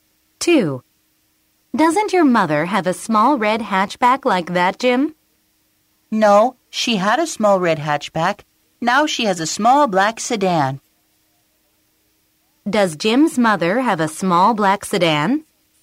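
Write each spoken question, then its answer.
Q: Does Jim's mother have a small black sedan?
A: Yes, she does.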